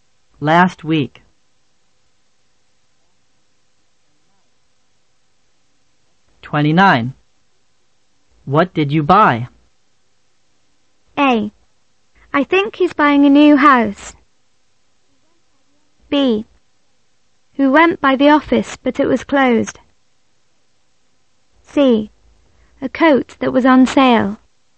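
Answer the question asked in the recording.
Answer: C: A coat that was on sale.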